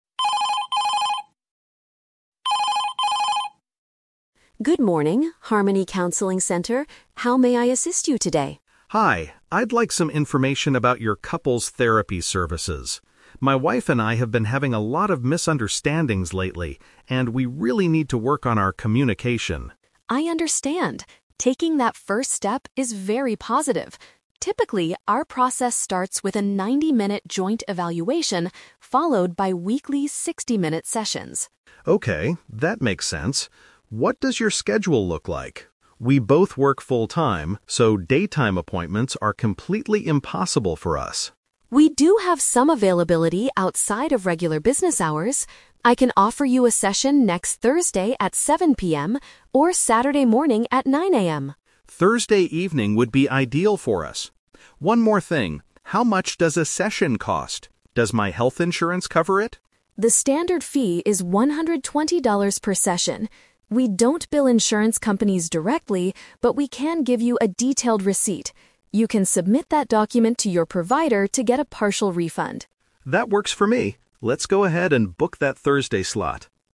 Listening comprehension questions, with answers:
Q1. Why is the client calling the counseling center?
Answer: To get help with frequent arguments and communication issues.

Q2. When will the couple most likely attend their therapy session?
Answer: On a weekday night.

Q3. How does the clinic handle payments regarding health insurance?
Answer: Patients pay the clinic first and request money back from their insurance later.

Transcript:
Receptionist: Good morning, Harmony Counseling Center. How may I assist you today?
Client: Hi, I'd like some information about your couples therapy services. My wife and I have been having a lot of misunderstandings lately, and we really need to work on our communication.
Receptionist: I understand. Taking that first step is very positive. Typically, our process starts with a 90-minute joint evaluation, followed by weekly 60-minute sessions.
Client: Okay, that makes sense. What does your schedule look like? We both work full-time, so daytime appointments are completely impossible for us.
Receptionist: We do have some availability outside of regular business hours. I can offer you a session next Thursday at 7:00 PM, or Saturday morning at 9:00 AM.
Client: Thursday evening would be ideal for us. One more thing, how much does a session cost? Does my health insurance cover it?
Receptionist: The standard fee is $120 per session. We don't bill insurance companies directly, but we can give you a detailed receipt. You can submit that document to your provider to get a partial refund.